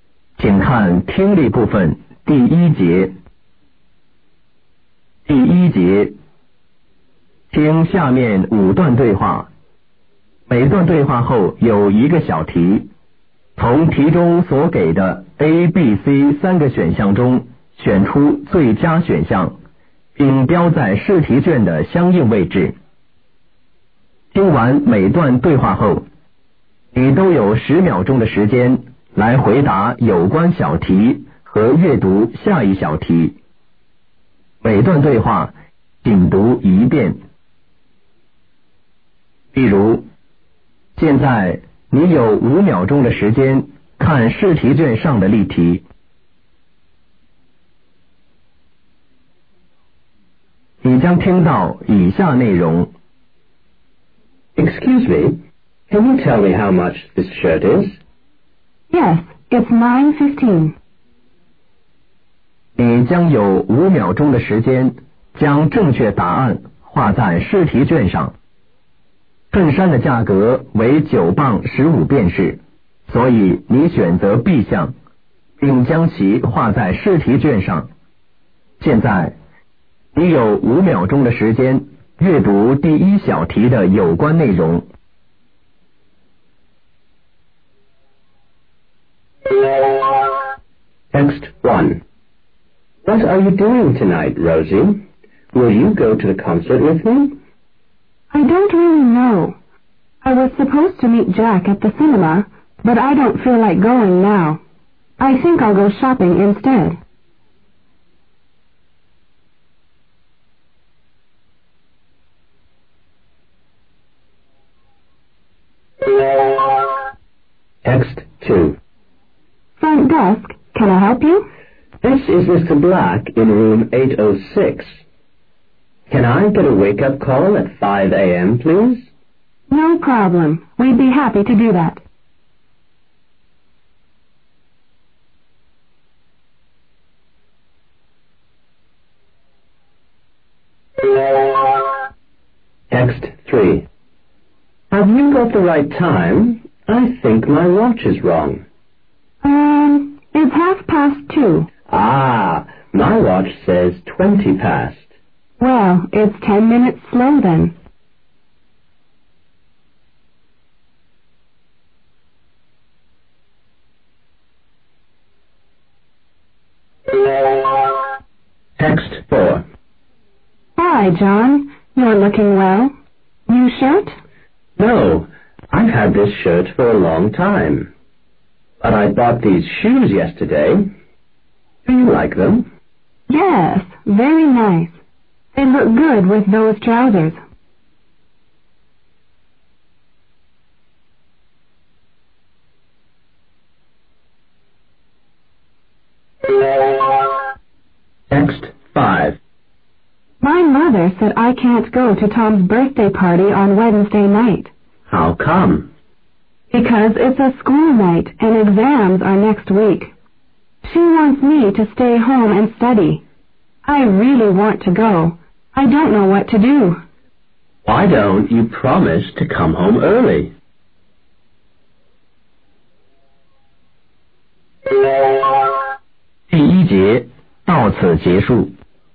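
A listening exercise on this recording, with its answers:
听下面5段对话.每段对话后有一个小题,从题中所给的A、B、c三个选项中选出最佳选项,并标在试题巷的相应位置.听完每段对话后,你都有10秒钟的时间来回答有关小题和阅读下一小题。每段对话仅读一遍.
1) What will the woman probably do tonight?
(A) See a film.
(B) Go to a concert.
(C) Do some shopping.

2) Where does the conversation take place?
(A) in an office.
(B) In a hotel.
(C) in a bedroom.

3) What time is it now?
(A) 2:30.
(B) 2:20.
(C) 2:10.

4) What did the man buy yesterday?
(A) Shirts.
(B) Shoes.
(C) Trousers.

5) What does the man suggest the woman do?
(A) study al home.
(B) Go to school.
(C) Come back early.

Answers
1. (C) Do some shopping.
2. (B) In a hotel.
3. (A) 2:30.
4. (B) Shoes.
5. (C) Come back early.

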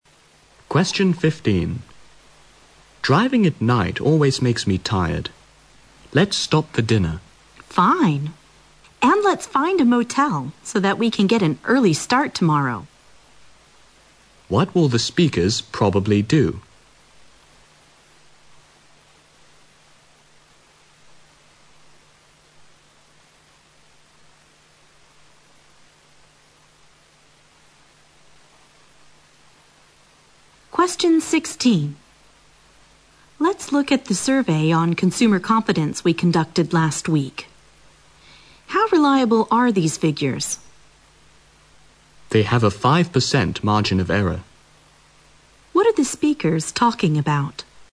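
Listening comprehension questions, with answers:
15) What will the speakers probably do?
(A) Cook their dinner.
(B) Rest for a while.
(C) Get their car fixed.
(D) Stop for the night.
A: (D) Stop for the night.

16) What are the speakers talking about?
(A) Newly-launched products.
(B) Consumer preferences.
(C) Survey results.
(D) Survey methods.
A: (C) Survey results.

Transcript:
M: Driving at night always makes me tired. Let's stop for dinner.
W: Fine. And let's find a motel, so that we can get an early start tomorrow.
Q: What will the speakers probably do?
W: Let's look at the survey on consumer confidence we conducted last week. How reliable are these figures?
M: They have a 5% margin of error

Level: 六级

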